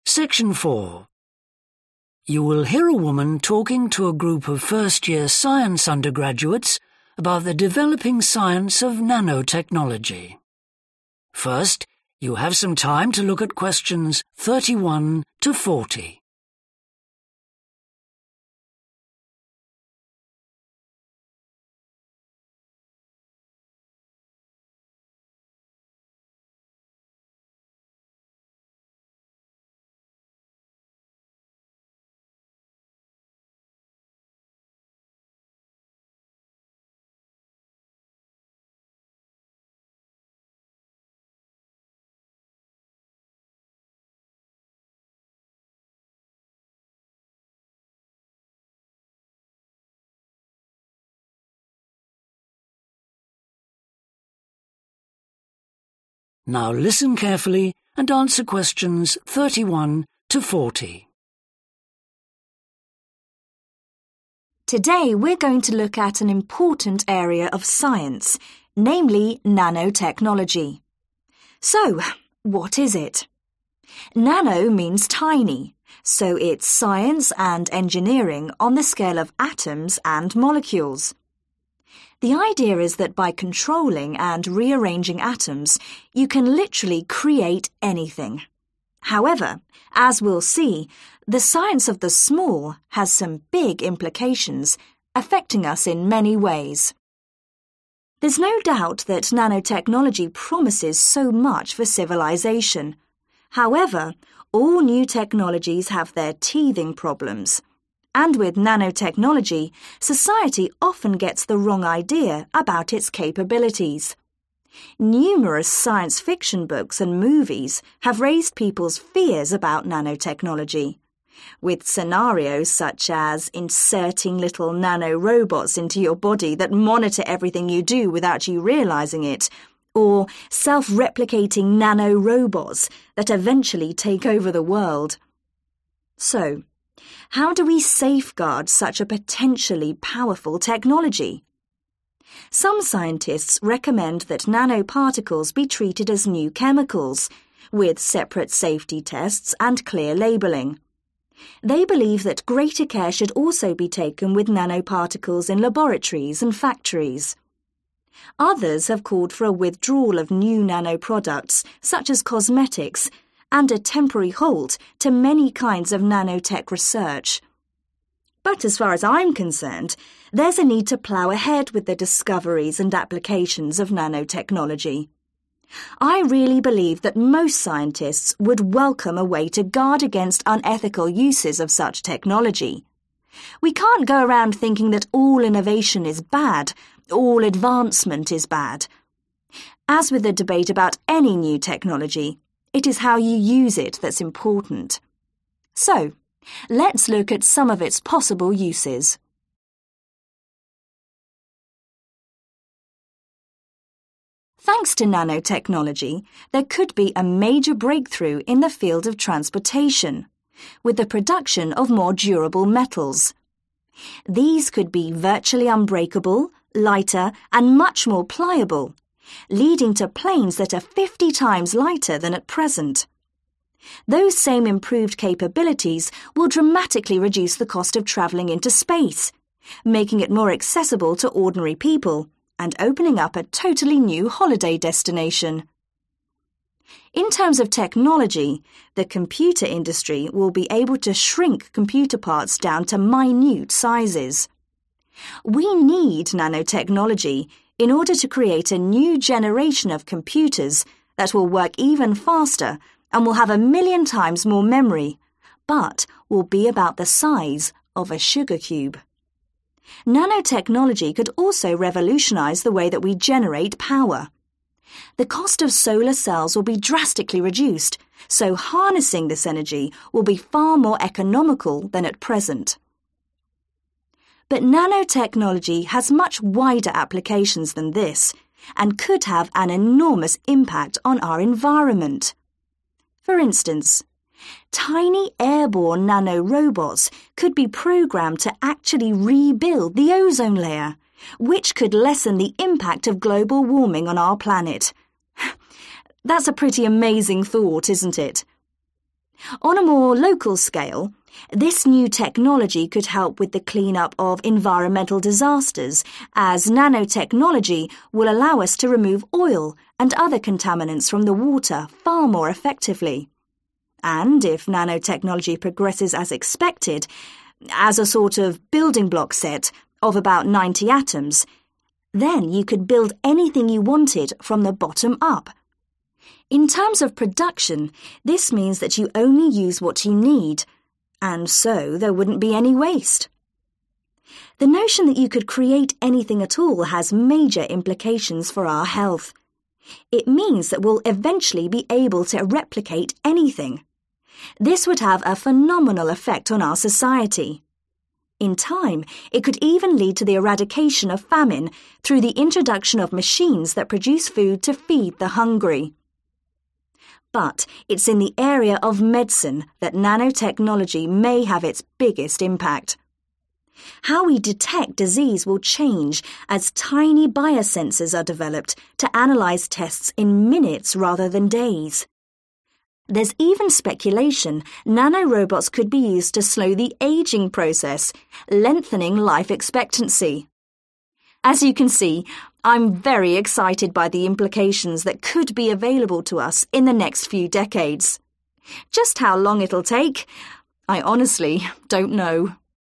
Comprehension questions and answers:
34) Nanotechnology could allow the development of stronger 34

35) 35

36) Computers will be even smaller, faster, and will have a greater 36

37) 37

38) Pollutants such as 38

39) There will be no 39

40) Analysis of medical 40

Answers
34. metal
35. space
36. memory
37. solar
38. oil
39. waste
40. tests